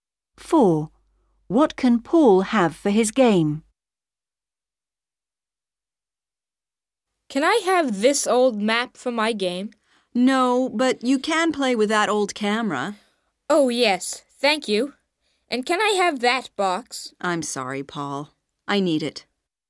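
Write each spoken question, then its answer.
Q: What can Paul have for his game?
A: the old camera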